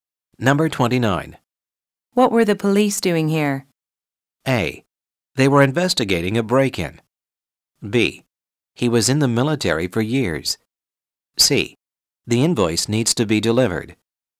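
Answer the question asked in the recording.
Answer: A: They were investigating a break-in.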